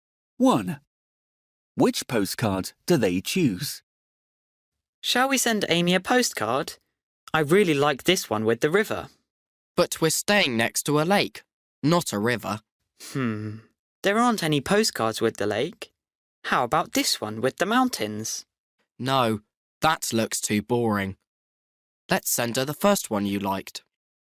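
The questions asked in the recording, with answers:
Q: Which postcard do they choose?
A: the one with the river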